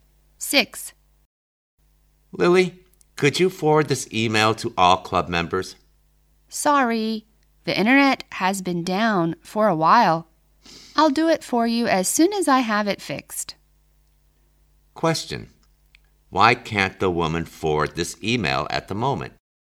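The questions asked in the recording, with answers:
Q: Why can't the woman forward this email at the moment?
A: The internet has been down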